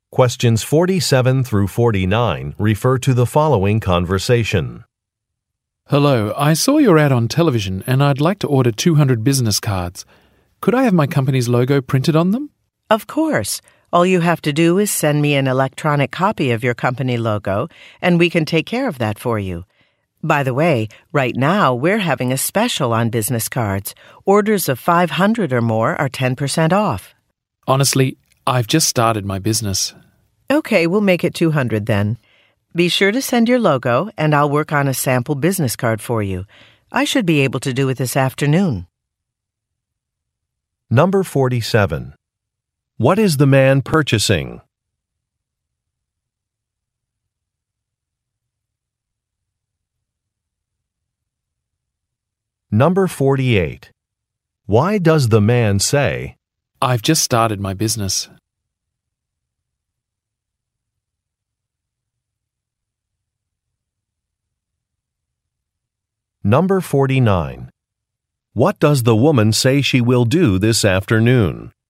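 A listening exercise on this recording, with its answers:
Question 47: What is the man purchasing?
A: Business cards

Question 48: Why does the man say, "I've just started my business"?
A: To reject an offer

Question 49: What does the woman say she will do this afternoon?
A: Create a sample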